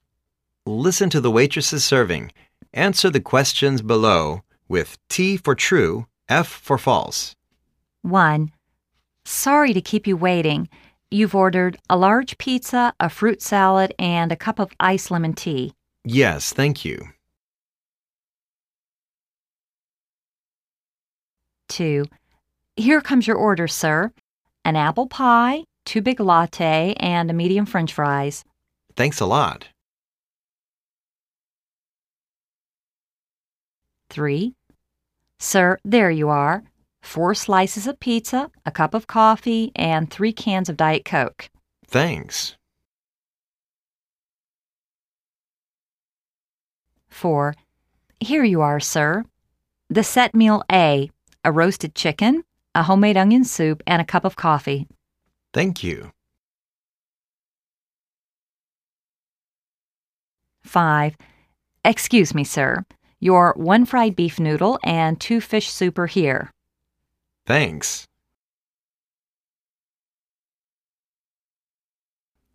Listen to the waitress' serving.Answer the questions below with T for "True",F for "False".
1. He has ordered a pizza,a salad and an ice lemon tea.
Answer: True

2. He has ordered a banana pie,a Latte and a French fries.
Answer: False

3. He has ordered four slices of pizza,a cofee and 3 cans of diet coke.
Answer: True

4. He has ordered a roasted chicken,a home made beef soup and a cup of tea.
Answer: False

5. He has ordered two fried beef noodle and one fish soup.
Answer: False